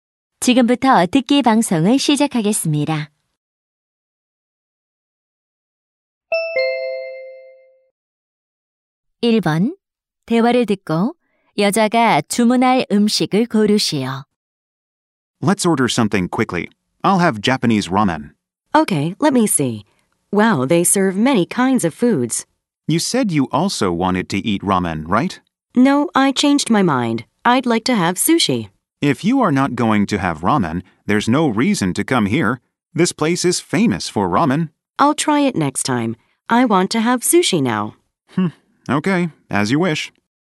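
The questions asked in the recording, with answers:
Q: 대화를 듣고 여자가 주문할 음식을 고르시오.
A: 초밥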